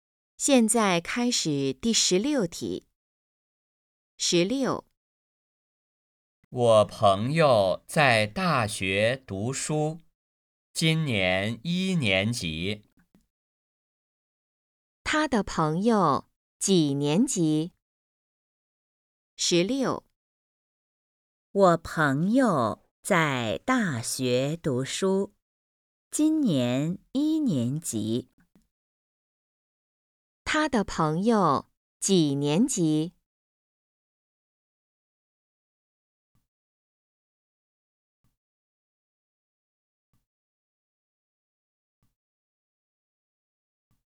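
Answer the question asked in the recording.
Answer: 一年级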